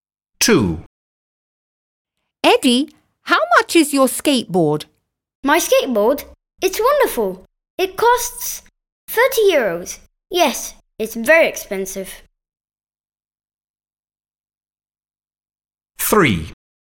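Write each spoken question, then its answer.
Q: Eddie, how much is your skateboard?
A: 30 euros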